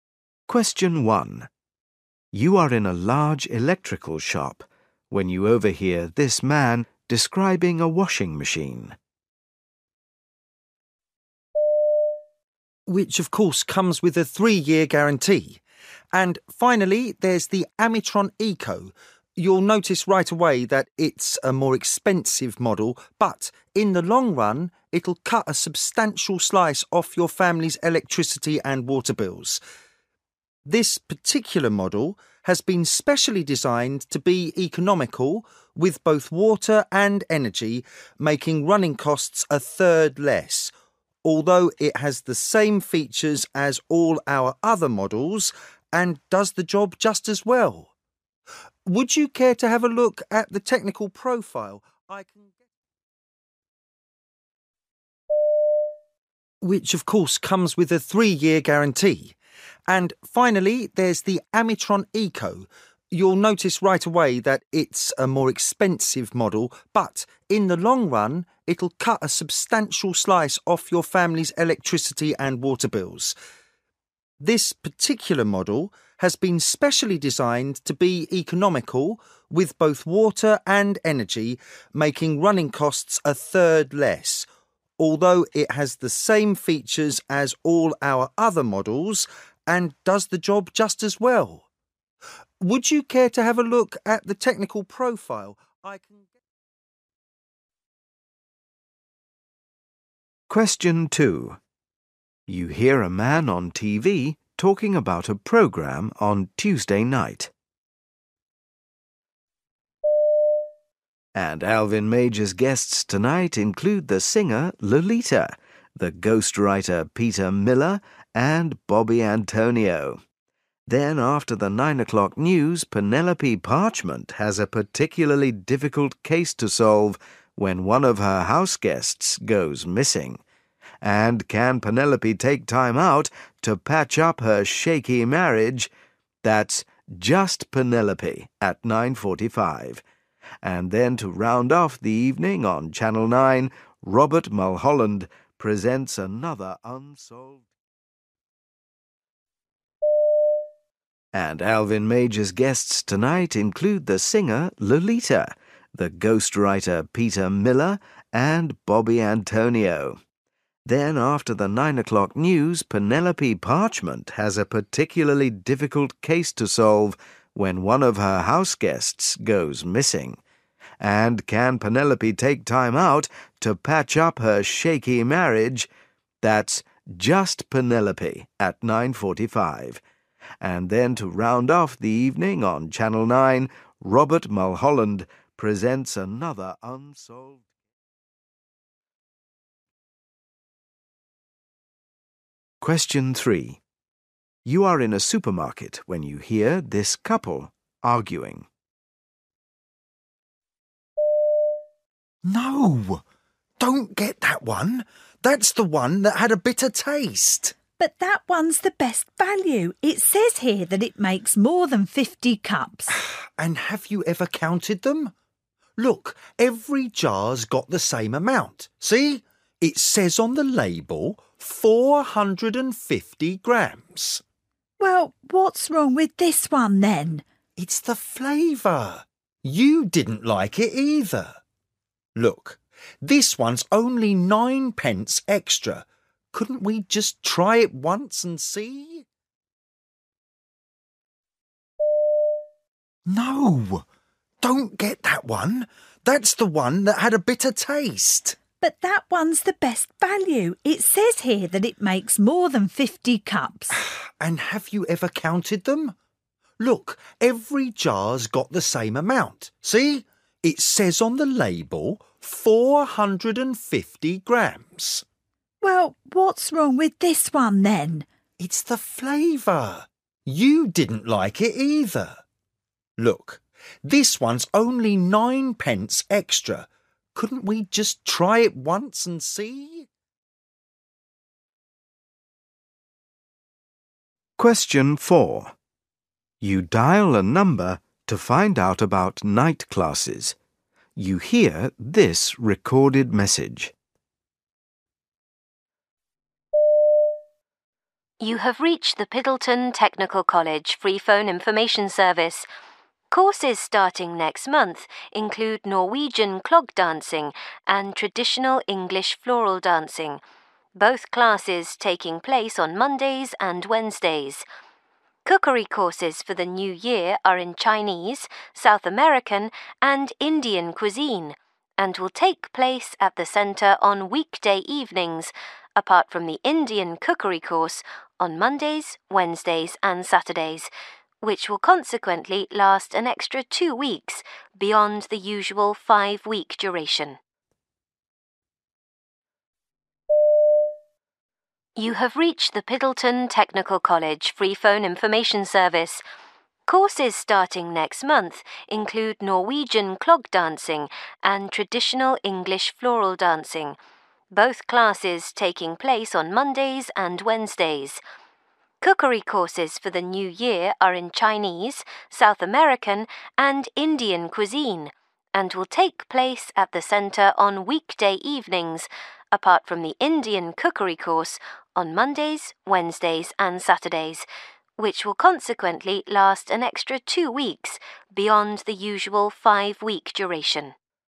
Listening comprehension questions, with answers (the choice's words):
You will hear people talking in eight different situations. For questions 1-8, choose the best answer (A, B or C).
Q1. You are in a large electrical shop when you overhear this man describing a washing machine. What is the advantage of this machine?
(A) it is cheaper to buy.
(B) it washes better.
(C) it costs less to use.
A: it costs less to use.

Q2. You hear a man on TV talking about a programme on Tuesday night. The programme Just Penelope is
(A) a chat show.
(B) a comedy series.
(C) a detective series.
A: a detective series.

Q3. You are in a supermarket when you hear this couple arguing. What are they arguing about?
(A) brand of coffee to buy.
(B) tin of soup to buy.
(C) brand of fruit juice to buy.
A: brand of coffee to buy.

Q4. You dial a number to find out about night classes. You hear this recorded message. None of the cookery courses are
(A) for more than six weeks.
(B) in English cooking.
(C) only at weekends.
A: in English cooking.

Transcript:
1 You are in a large electrical shop when you overhear this man describing a washing machine.
which, of course, comes with a three-year guarantee. And finally, there's the 'Amitron Eco'. You'll notice right away that it's a more expensive model but, in the long run, it'll cut a substantial slice off your family's electricity and water bills. This particular model has been specially designed to be economical with both water and energy making running costs a third less, although it has the same features as all our other models and does the job just as well. Would you care to have a look at the technical profile ...
2 You hear a man on TV talking about a programme on Tuesday night.
and Alvin Major's guests tonight include the singer 'Lolita', the ghost writer Peter Miller and Bobby Antonio, then after the 9 o'clock news, Penelope Parchment has a particularly difficult case to solve when one of her house guests goes missing ... and can Penelope take time out to patch up her shaky marriage? That's 'Just Penelope' at 9:45 ... and then to round off the evening on Channel 9, Robert Mulholland presents another another ...
3 You are in a supermarket when you hear this couple arguing.
M: No, don't get that one. That's the one that had a bitter taste.
W: But that one's the best value. It says here that it makes more than fifty cups.
M: And have you ever counted them? Look, every jar's got the same amount ... see! It says on the label 450 grams.
W: Well, what's wrong with this one then?
M: It's the flavour. You didn't like it either. Look, this one's only 9 pence extra. Couldn't we just try it once and see ...
4 You dial a number to find out about night classes.
You have reached the Piddleton Technical College freephone information service. Courses starting next month include Norwegian clog dancing and traditional English floral dancing – both classes taking place on Mondays and Wednesdays. Cookery courses for the new year are in Chinese, South American and Indian cuisine and will take place at the centre on weekday evenings apart from the Indian cookery course on Mondays, Wednesdays and Saturdays, which will consequently last an extra 2 weeks beyond the usual 5-week duration.